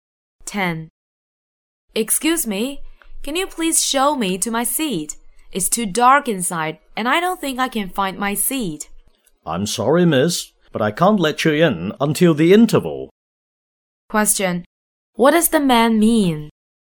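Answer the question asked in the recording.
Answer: She must wait until the interval to go in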